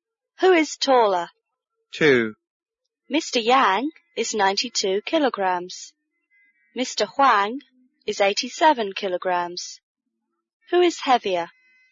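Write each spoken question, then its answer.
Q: Who is heavier?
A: Mr. Yang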